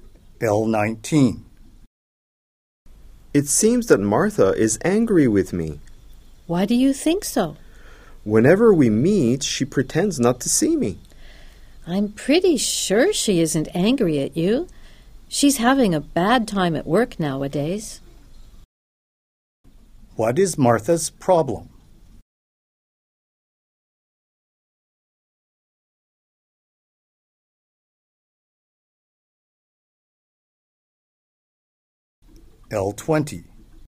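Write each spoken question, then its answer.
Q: What is Martha's problem?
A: She is having a bad time at work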